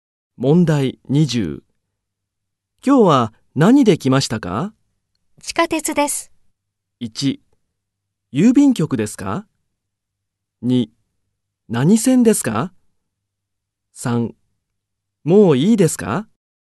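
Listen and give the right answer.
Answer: 2: 何線ですか?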